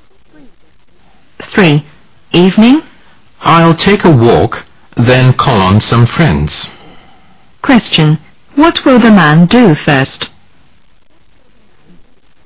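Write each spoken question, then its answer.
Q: What will the man do first?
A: Take a walk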